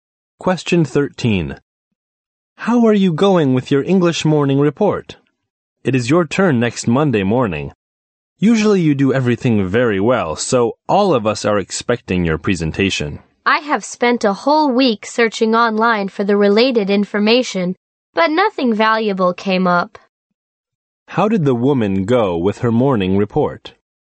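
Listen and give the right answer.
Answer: Not well; she found nothing valuable online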